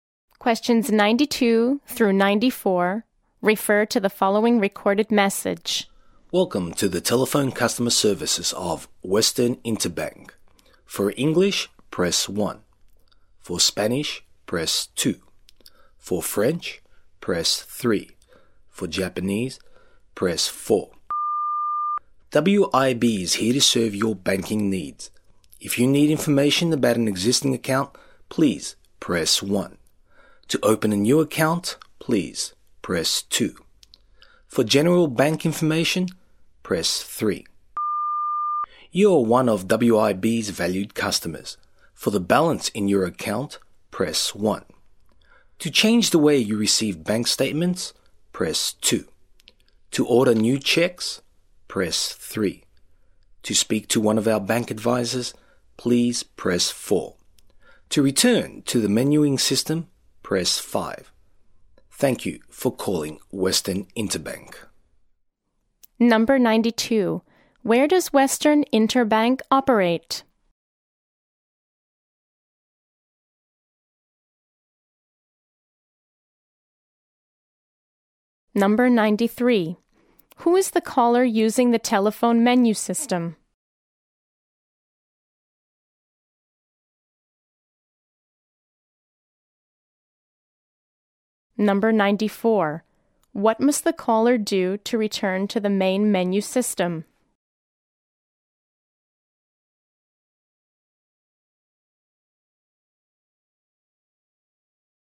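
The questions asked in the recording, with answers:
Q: Who is the caller using the telephone menu system?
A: An existing customer with an account

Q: What must the caller do to return to the main menu system?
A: Press 5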